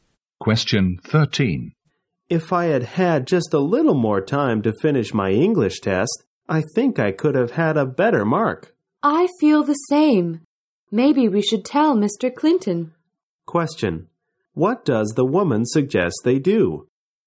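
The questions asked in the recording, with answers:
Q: What does the woman suggest they do?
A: Tell Mr. Clinton they needed more time for the test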